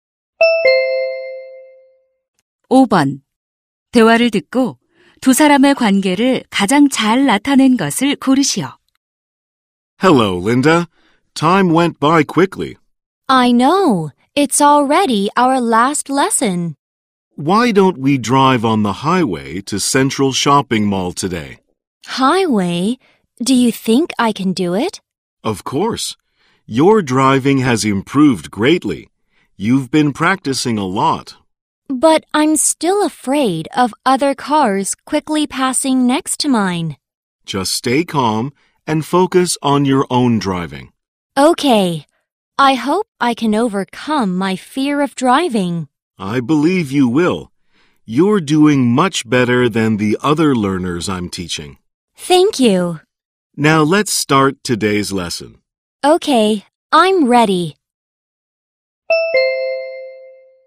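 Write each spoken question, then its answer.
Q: 대화를 듣고 두 사람의 관계를 가장 잘 나타낸 것을 고르시오.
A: 운전 강사 - 수강생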